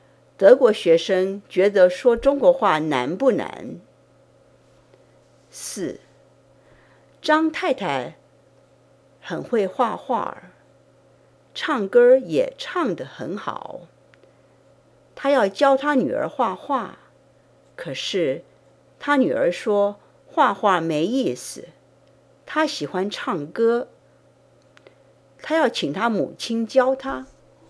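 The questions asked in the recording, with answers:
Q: 张太太的女儿要学什么?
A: 唱歌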